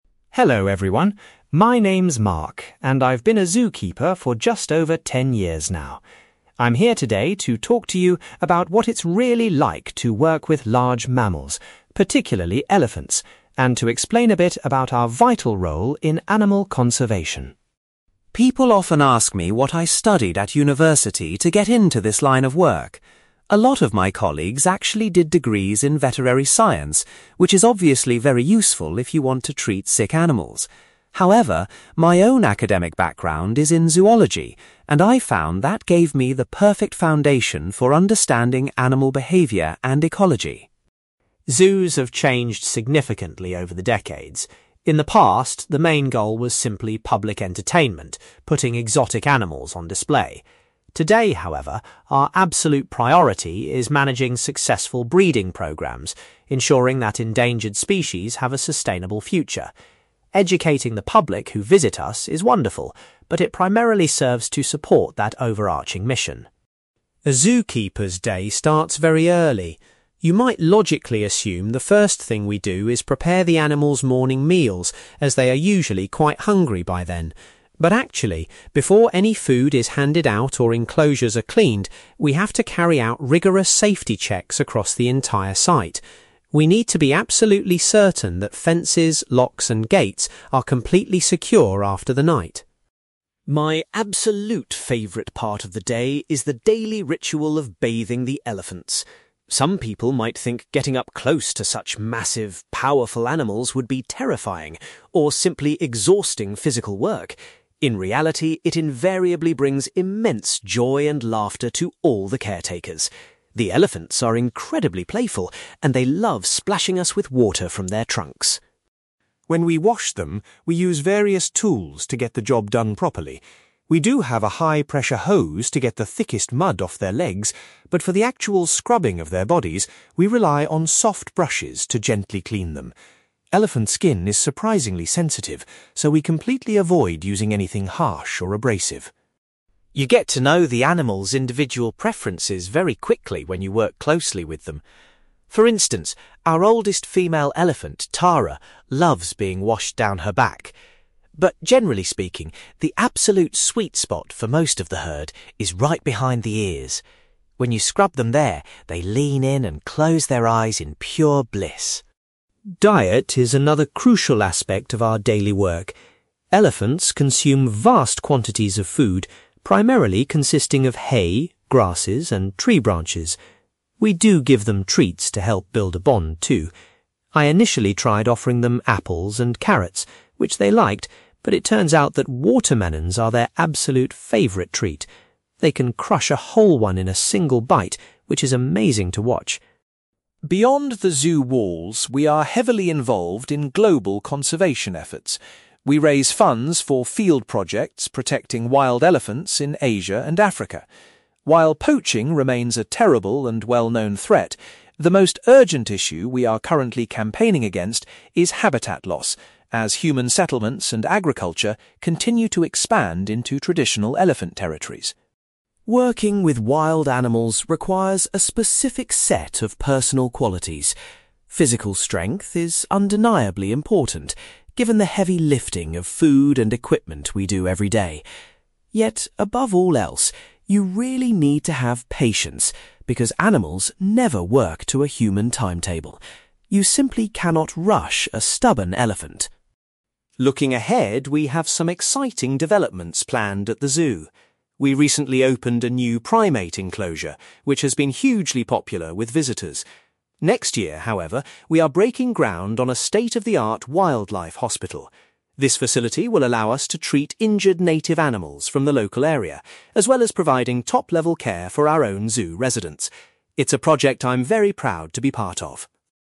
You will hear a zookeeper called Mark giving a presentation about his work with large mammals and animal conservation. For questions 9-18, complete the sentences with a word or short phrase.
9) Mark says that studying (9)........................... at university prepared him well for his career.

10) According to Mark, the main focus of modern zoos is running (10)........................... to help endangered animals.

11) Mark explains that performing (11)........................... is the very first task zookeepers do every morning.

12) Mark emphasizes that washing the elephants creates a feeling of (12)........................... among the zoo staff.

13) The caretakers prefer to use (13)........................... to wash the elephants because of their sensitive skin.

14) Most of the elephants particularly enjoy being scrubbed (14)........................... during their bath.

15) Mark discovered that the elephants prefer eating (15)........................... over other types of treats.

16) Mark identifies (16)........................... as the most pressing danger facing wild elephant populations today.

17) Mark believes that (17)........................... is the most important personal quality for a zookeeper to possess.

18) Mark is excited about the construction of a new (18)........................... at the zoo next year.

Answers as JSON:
{"9": "zoology", "10": "breeding programmes", "11": "safety checks", "12": "laughter", "13": "soft brushes", "14": "behind the ears", "15": "watermelons", "16": "habitat loss", "17": "patience", "18": "wildlife hospital"}

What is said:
Mark: Hello, everyone. My name's Mark, and I've been a zookeeper for just over ten years now. I'm here today to talk to you about what it's really like to work with large mammals, particularly elephants, and to explain a bit about our vital role in animal conservation.
People often ask me what I studied at university to get into this line of work. A lot of my colleagues actually did degrees in veterinary science, which is obviously very useful if you want to treat sick animals. However, my own academic background is in zoology, and I found that gave me the perfect foundation for understanding animal behaviour and ecology.
Zoos have changed significantly over the decades. In the past, the main goal was simply public entertainment, putting exotic animals on display. Today, however, our absolute priority is managing successful breeding programmes, ensuring that endangered species have a sustainable future. Educating the public who visit us is wonderful, but it primarily serves to support that overarching mission.
A zookeeper's day starts very early. You might logically assume the first thing we do is prepare the animals' morning meals, as they are usually quite hungry by then! But actually, before any food is handed out or enclosures are cleaned, we have to carry out rigorous safety checks across the entire site. We need to be absolutely certain that fences, locks, and gates are completely secure after the night.
My absolute favourite part of the day is the daily ritual of bathing the elephants. Some people might think getting up close to such massive, powerful animals would be terrifying, or simply exhausting physical work. In reality, it invariably brings immense joy and laughter to all the caretakers. The elephants are incredibly playful, and they love splashing us with water from their trunks!
When we wash them, we use various tools to get the job done properly. We do have a high-pressure hose to get the thickest mud off their legs, but for the actual scrubbing of their bodies, we rely on soft brushes to gently clean them. Elephant skin is surprisingly sensitive, so we completely avoid using anything harsh or abrasive.
You get to know the animals' individual preferences very quickly when you work closely with them. For instance, our oldest female elephant, Tara, loves being washed down her back. But generally speaking, the absolute sweet spot for most of the herd is right behind the ears. When you scrub them there, they lean in and close their eyes in pure bliss.
Diet is another crucial aspect of our daily work. Elephants consume vast quantities of food, primarily consisting of hay, grasses, and tree branches. We do give them treats to help build a bond, too. I initially tried offering them apples and carrots, which they liked, but it turns out that watermelons are their absolute favourite treat. They can crush a whole one in a single bite, which is amazing to watch!
Beyond the zoo walls, we are heavily involved in global conservation efforts. We raise funds for field projects protecting wild elephants in Asia and Africa. While poaching remains a terrible and well-known threat, the most urgent issue we are currently campaigning against is habitat loss, as human settlements and agriculture continue to expand into traditional elephant territories.
Working with wild animals requires a specific set of personal qualities. Physical strength is undeniably important, given the heavy lifting of food and equipment we do every day. Yet, above all else, you really need to have patience because animals never work to a human timetable. You simply cannot rush a stubborn elephant!
Looking ahead, we have some exciting developments planned at the zoo. We recently opened a new primate enclosure, which has been hugely popular with visitors. Next year, however, we are breaking ground on a state-of-the-art wildlife hospital. This facility will allow us to treat injured native animals from the local area, as well as providing top-level care for our own zoo residents. It's a project I'm very proud to be part of.

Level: B2